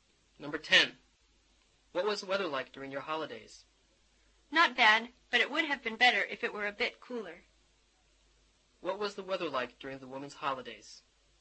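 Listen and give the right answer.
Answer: A bit too hot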